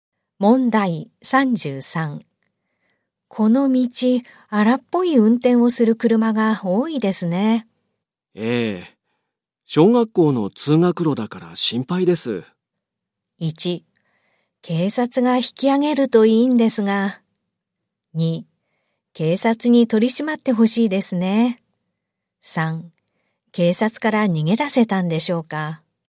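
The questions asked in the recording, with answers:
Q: この道、荒っぽい運転をする車が多いですね。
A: 2: 警察に取り締まってほしいですね。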